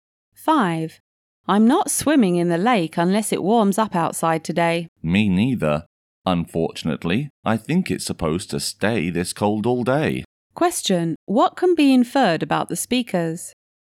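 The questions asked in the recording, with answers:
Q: What can be inferred about the speakers?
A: They probably won't swim in the lake today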